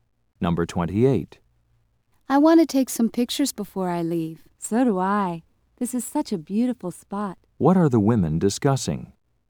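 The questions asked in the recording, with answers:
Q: What are the women discussing?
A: Taking pictures of a beautiful place.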